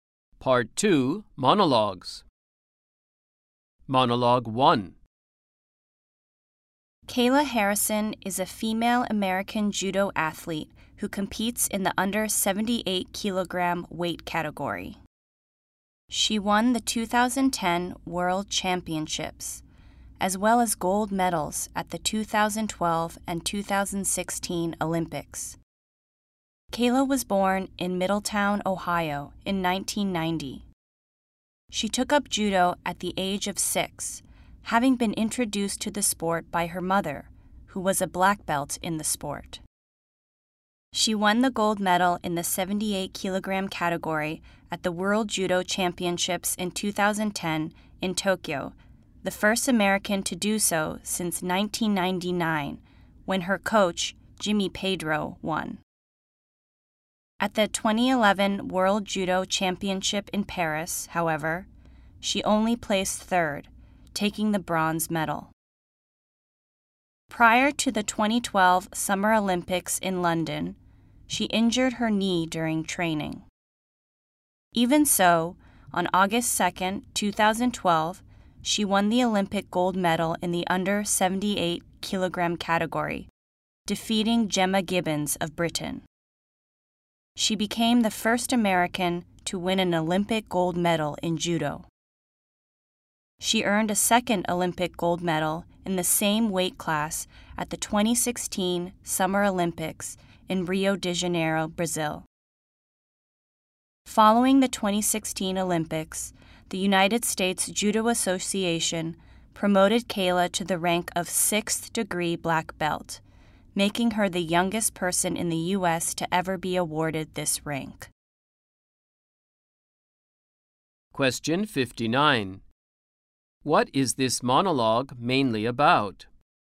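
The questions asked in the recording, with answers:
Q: What is this monologue mainly about?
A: Judo athlete Kayla Harrison's career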